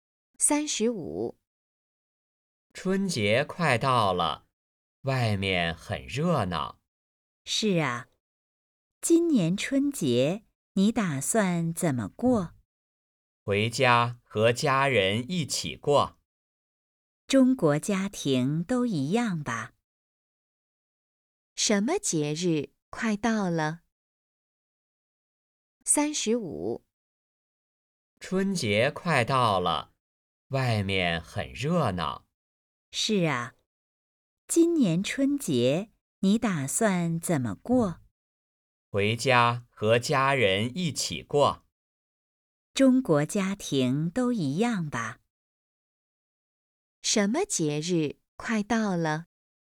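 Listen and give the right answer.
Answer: 春节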